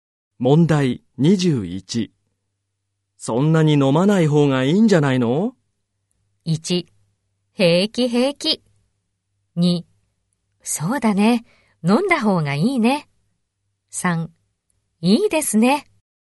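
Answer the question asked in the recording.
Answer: 1: 平気平気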